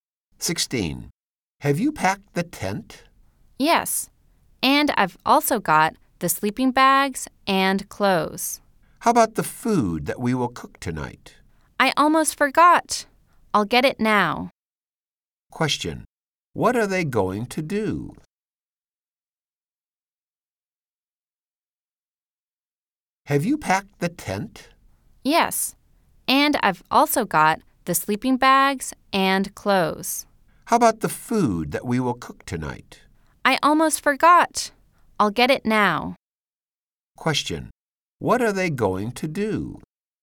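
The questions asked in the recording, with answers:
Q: What are they going to do?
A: Go camping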